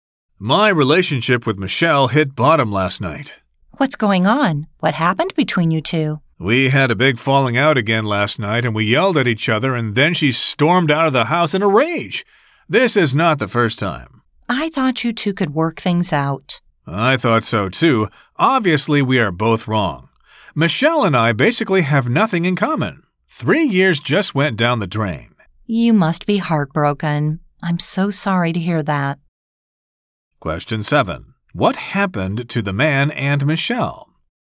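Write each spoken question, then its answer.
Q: What happened to the man and Michelle?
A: They had a big fight and their relationship seems to be over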